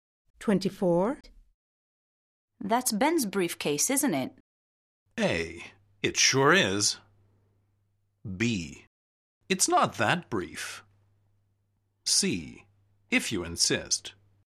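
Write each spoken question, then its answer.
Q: That's Ben's briefcase, isn't it?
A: A: It sure is.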